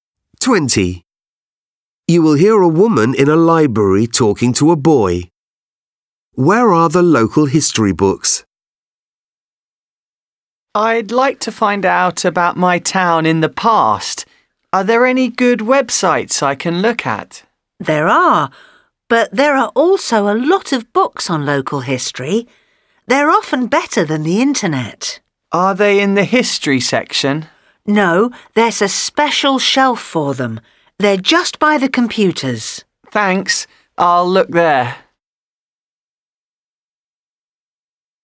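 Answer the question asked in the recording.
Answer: On a special shelf by the computers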